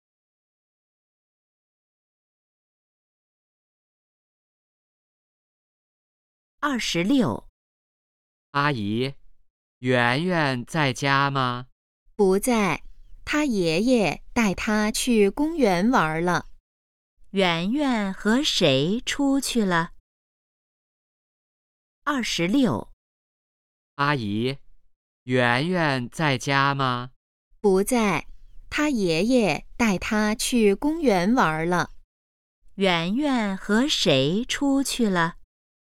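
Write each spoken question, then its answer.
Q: 圆圆和谁出去了?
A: 爷爷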